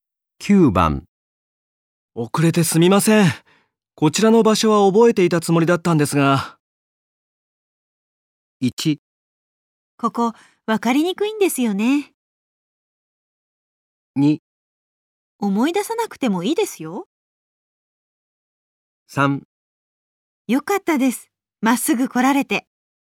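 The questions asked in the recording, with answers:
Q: 遅れてすみません。こちらの場所は覚えていたつもりだったんですが。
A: 1: ここ、わかりにくいんですよね。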